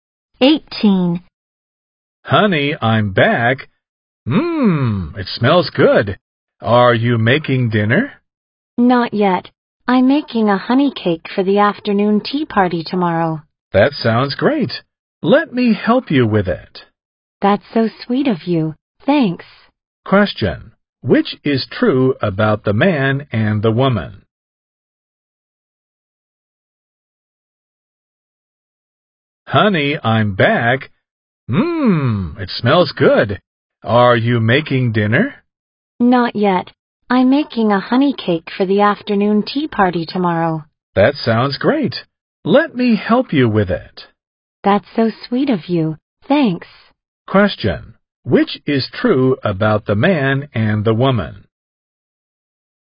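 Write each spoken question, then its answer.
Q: Which is true about the man and the woman?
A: The woman is making a honey cake for a tea party and the man will help her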